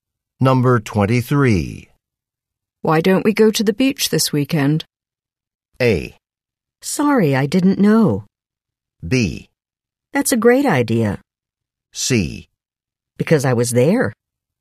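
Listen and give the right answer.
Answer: B: That's a great idea.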